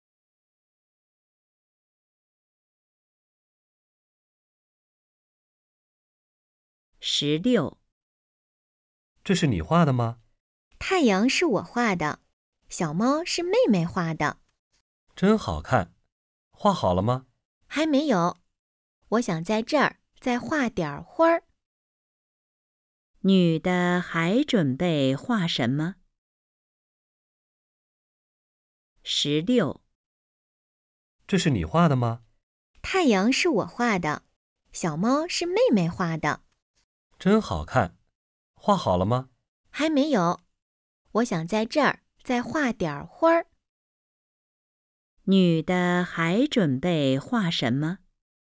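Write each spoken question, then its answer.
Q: 女的还准备画什么?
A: 花儿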